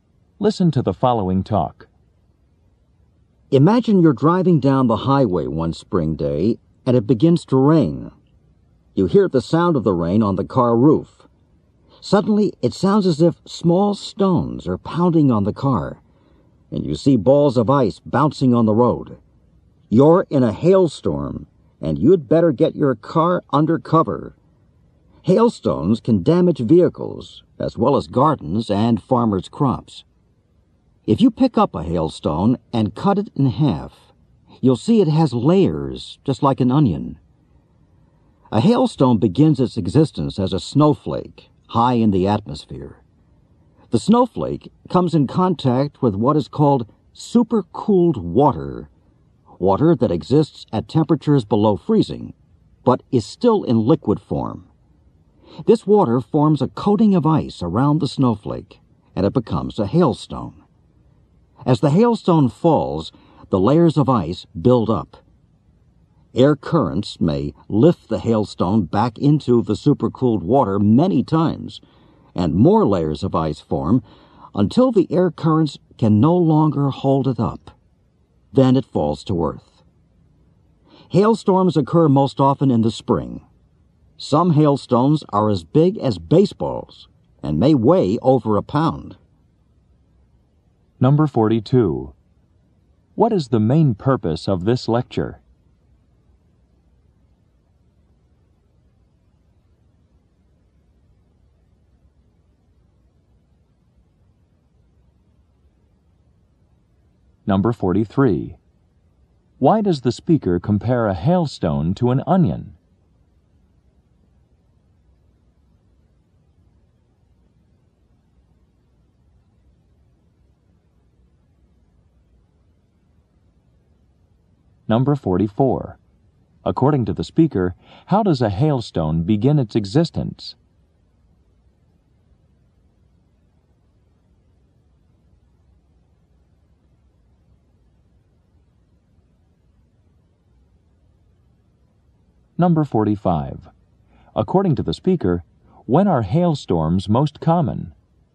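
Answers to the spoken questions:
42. To explain how hailstones form
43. Because both have layers
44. As a snowflake high in the atmosphere
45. In the spring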